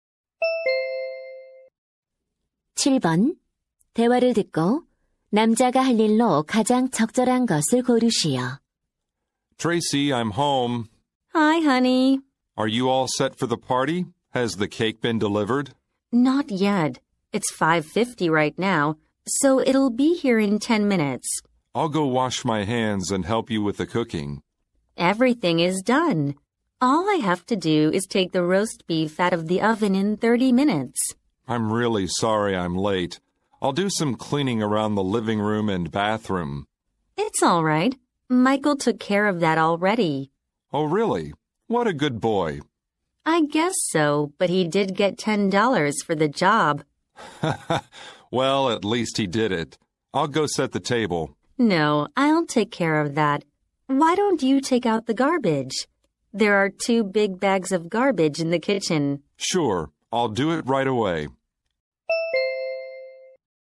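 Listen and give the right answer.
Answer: 쓰레기 버리기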